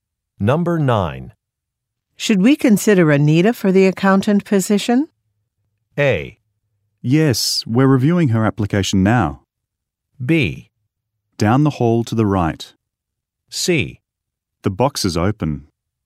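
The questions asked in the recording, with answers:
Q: Should we consider Anita for the accountant position?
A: A: Yes, we're reviewing her application now.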